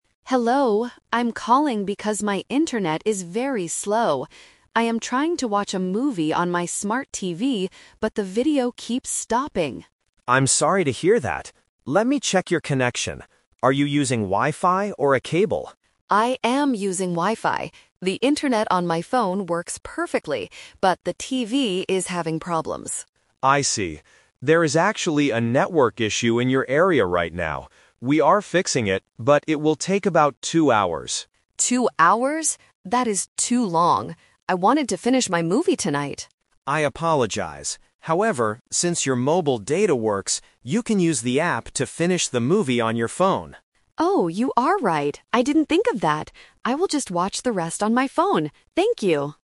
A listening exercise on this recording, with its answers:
Listen to the conversation and choose the correct answer (A, B, or C) for each question.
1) What is the customer's problem?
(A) Her phone is broken.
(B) Her internet is too slow.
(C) She cannot find a good movie.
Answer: Her internet is too slow.

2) How long will it take to fix the network issue?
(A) Two minutes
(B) Two hours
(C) Tomorrow morning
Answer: Two hours

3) How will the customer finish watching the movie?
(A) On her TV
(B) On her computer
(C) On her phone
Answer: On her phone

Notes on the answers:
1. The customer says in the first sentence, "my internet is very slow." Option A is the trap because the "phone" is mentioned, but she says the internet on her phone "works perfectly." Option C is not mentioned.
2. The agent says, "We are fixing it, but it will take about two hours." Option A is a trap using the same number "two" but the wrong unit of time. Option C is not mentioned.
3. The customer originally wanted to watch the movie on her "TV" (Option A is the trap), "but" the internet is slow. The agent suggests using her phone, and she agrees: "I will just watch the rest on my phone." Option B is not mentioned.

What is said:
Customer: Hello, I'm calling because my internet is very slow. I am trying to watch a movie on my smart TV, but the video keeps stopping!
Agent: I'm sorry to hear that. Let me check your connection. Are you using Wi-Fi or a cable?
Customer: I am using Wi-Fi. The internet on my phone works perfectly, but the TV is having problems.
Agent: I see. There is actually a network issue in your area right now. We are fixing it, but it will take about two hours.
Customer: Two hours? That is too long. I wanted to finish my movie tonight.
Agent: I apologize. However, since your mobile data works, you can use the app to finish the movie on your phone.
Customer: Oh, you are right. I didn't think of that. I will just watch the rest on my phone. Thank you!

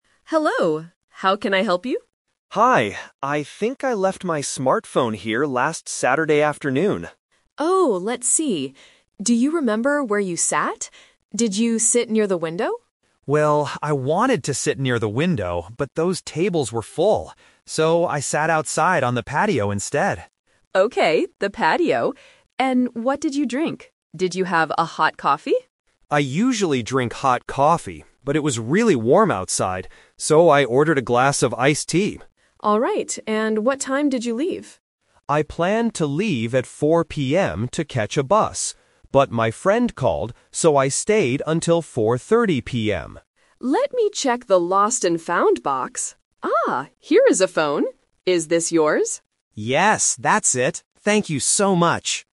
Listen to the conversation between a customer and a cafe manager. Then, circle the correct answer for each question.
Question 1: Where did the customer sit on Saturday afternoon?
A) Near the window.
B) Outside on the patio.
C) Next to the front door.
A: Outside on the patio.

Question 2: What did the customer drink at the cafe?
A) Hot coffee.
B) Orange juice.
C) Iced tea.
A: Iced tea.

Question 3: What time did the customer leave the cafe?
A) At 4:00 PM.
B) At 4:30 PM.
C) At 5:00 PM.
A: At 4:30 PM.

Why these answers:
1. The customer says, "So, I sat outside on the patio instead." Option (A) is the trap (The Twist); the manager asks if he sat near the window, and he wanted to, but the tables were full. Option (C) is a plausible place to sit but is never mentioned.
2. The customer explains, "So, I ordered a glass of iced tea." Option (A) is the trap; he usually drinks hot coffee, but he didn't drink it this time because it was warm outside. Option (B) is a common cafe drink but is not in the audio.
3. The customer states clearly, "But my friend called, so I stayed until 4:30 PM." Option (A) is the trap; he planned to leave at 4:00 PM, but his plan changed. Option (C) is never mentioned.

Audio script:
Manager: Hello. How can I help you?
Customer: Hi. I think I left my smartphone here last Saturday afternoon.
Manager: Oh, let's see. Do you remember where you sat? Did you sit near the window?
Customer: Well, I wanted to sit near the window, but those tables were full. So, I sat outside on the patio instead.
Manager: Okay, the patio. And what did you drink? Did you have a hot coffee?
Customer: I usually drink hot coffee, but it was really warm outside. So, I ordered a glass of iced tea.
Manager: Alright. And what time did you leave?
Customer: I planned to leave at 4:00 PM to catch a bus. But my friend called, so I stayed until 4:30 PM.
Manager: Let me check the lost and found box... Ah, here is a phone. Is this yours?
Customer: Yes, that's it! Thank you so much!

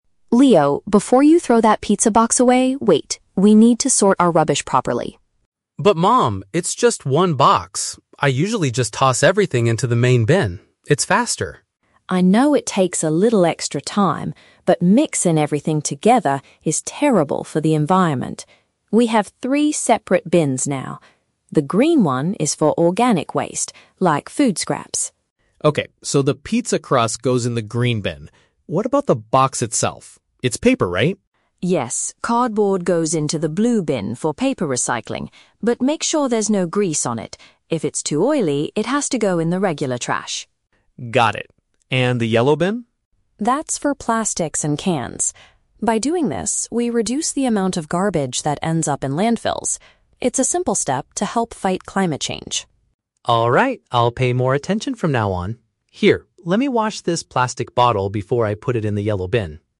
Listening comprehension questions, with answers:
Listen to the conversation between a mother and her son, and choose the correct answer (A, B, or C) for each question.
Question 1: Why does the mother stop Leo at the beginning?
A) Because he was putting the trash in the wrong place.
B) Because she wants him to finish eating his pizza.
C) Because the main garbage bin is completely full.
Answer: Because he was putting the trash in the wrong place.

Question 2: Where should Leo put the greasy parts of the pizza box?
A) In the blue recycling bin.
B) In the standard garbage bin.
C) In the green bin with food scraps.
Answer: In the standard garbage bin.

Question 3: What is the main benefit of sorting the waste, according to the mother?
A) It helps the family earn money from recycling centers.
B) It keeps their kitchen clean and smelling fresh.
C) It decreases the volume of trash sent to dump sites.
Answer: It decreases the volume of trash sent to dump sites.

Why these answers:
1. Mom stops Leo because he is about to throw the pizza box into the "main bin" without sorting it ("We need to sort our rubbish properly").
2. Mom says that if the cardboard is too oily (greasy), "it has to go in the regular trash." (Paraphrasing: regular trash = standard garbage bin).
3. Mom explains that sorting waste helps to "reduce the amount of garbage that ends up in landfills." (Paraphrasing: reduce the amount = decreases the volume; landfills = dump sites).

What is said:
Mom: Leo, before you throw that pizza box away, wait! We need to sort our rubbish properly.
Leo: But Mom, it's just one box. I usually just toss everything into the main bin. It's faster.
Mom: I know it takes a little extra time, but mixing everything together is terrible for the environment. We have three separate bins now. The green one is for organic waste, like food scraps.
Leo: Okay, so the pizza crust goes in the green bin. What about the box itself? It's paper, right?
Mom: Yes, cardboard goes into the blue bin for paper recycling. But make sure there's no grease on it. If it's too oily, it has to go in the regular trash.
Leo: Got it. And the yellow bin?
Mom: That's for plastics and cans. By doing this, we reduce the amount of garbage that ends up in landfills. It's a simple step to help fight climate change.
Leo: Alright, I'll pay more attention from now on. Here, let me wash this plastic bottle before I put it in the yellow bin.

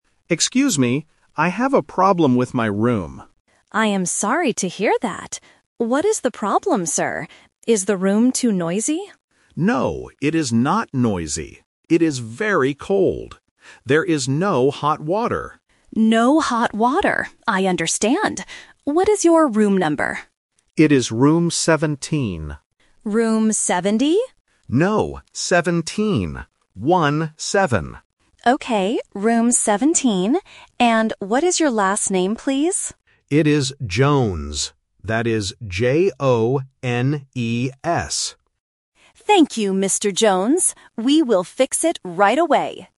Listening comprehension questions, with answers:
Listen to the conversation and choose the correct answer (A, B, or C).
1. What is the problem with the room?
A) It is too noisy.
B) There is no hot water.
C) The bed is too small.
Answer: There is no hot water.

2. What is the guest's room number?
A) Room 17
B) Room 70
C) Room 7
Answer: Room 17

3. How does the guest spell his last name?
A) J-A-N-E-S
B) G-O-N-E-S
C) J-O-N-E-S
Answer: J-O-N-E-S

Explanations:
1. The guest clearly states, "There is no hot water." Option (A) is the trap because the receptionist asks if the room is "noisy", but the guest replies, "No, it is not noisy." Option (C) is not mentioned.
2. The guest says his room is number 17. The receptionist mishears it as "70" (The Trap), but the guest corrects her: "No, 17. One-seven." This tests the student's ability to hear the difference between "-teen" and "-ty". Option (C) is not mentioned.
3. The guest spells his last name clearly: J-O-N-E-S. Option (A) uses the wrong vowel "A", and Option (B) uses the letter "G" instead of "J", which is a very common listening mistake for beginners.

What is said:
Guest: Excuse me. I have a problem with my room.
Receptionist: I am sorry to hear that. What is the problem, sir? Is the room too noisy?
Guest: No, it is not noisy. It is very cold. There is no hot water.
Receptionist: No hot water. I understand. What is your room number?
Guest: It is room 17.
Receptionist: Room 70?
Receptionist: Okay, room 17. And what is your last name, please?
Guest: It is Jones. That is J-O-N-E-S.

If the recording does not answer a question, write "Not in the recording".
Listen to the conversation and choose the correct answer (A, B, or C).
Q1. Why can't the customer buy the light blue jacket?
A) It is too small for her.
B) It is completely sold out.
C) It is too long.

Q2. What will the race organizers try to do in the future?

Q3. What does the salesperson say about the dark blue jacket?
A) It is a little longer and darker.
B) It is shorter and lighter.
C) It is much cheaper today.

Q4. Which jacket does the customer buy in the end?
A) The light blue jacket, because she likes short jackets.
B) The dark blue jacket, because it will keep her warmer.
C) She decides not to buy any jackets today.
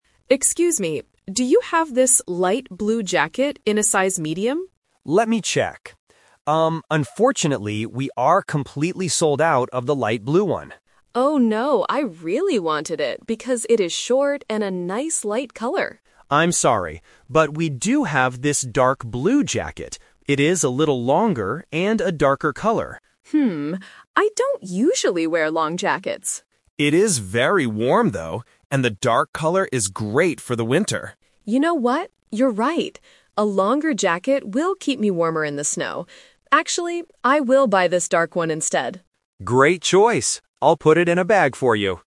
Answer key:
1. It is completely sold out.
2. Not in the recording
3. It is a little longer and darker.
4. The dark blue jacket, because it will keep her warmer.

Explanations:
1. The salesperson clearly states that "we are completely sold out of the light blue one." Option A is a plausible problem when shopping for clothes, but it is not mentioned. Option C is a trap because being "longer" is a feature of the dark blue jacket, not the light blue one.
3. The salesperson suggests the alternative jacket and says, "It is a little longer and a darker color." Option B is a trap because short and light are the features of the jacket the customer originally wanted. Option C is a plausible guess for a sales pitch, but the price is never mentioned.
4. This question uses the "Twist" technique. The customer originally wants the short, light blue jacket and hesitates to try the long one. However, she changes her mind when she realizes the longer jacket "will keep me warmer in the snow." She decides to buy the dark blue one. Option A is the main trap (her original plan). Option C is incorrect.

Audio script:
Customer: Excuse me, do you have this light blue jacket in a size medium?
Salesperson: Let me check. Um, unfortunately, we are completely sold out of the light blue one.
Customer: Oh, no. I really wanted it because it is short and a nice light color.
Salesperson: I'm sorry. But we do have this dark blue jacket. It is a little longer and a darker color.
Customer: Hmm. I don't usually wear long jackets.
Salesperson: It is very warm, though. And the dark color is great for the winter.
Customer: You know what? You're right. A longer jacket will keep me warmer in the snow. Actually, I will buy this dark one instead.

